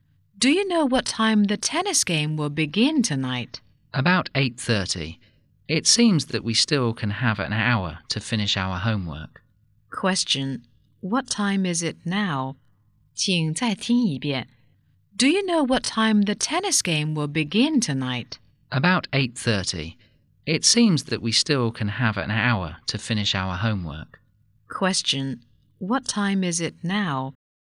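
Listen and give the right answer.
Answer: 7:30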